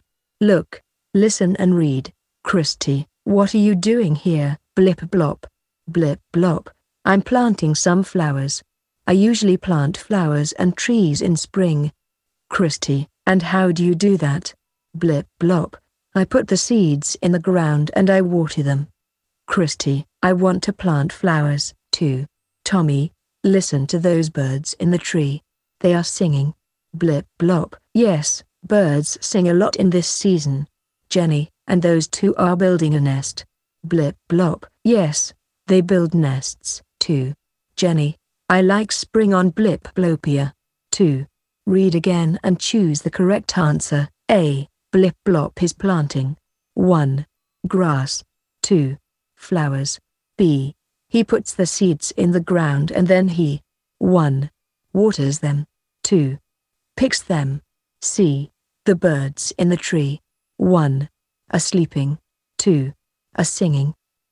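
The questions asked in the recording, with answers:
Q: Blip blop is planting.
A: 2: Flowers

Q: He puts the seeds in the ground and then he.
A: 1: Waters them

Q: The birds in the tree.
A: 2: A singing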